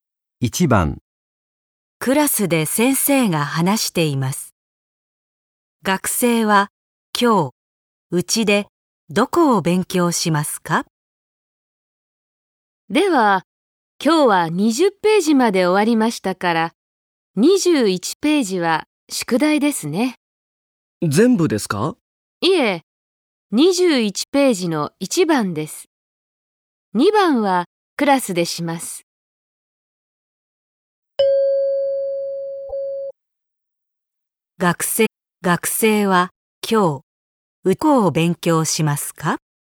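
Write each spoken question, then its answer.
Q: 学生は今日、どこを勉強しますか?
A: 21ページの1番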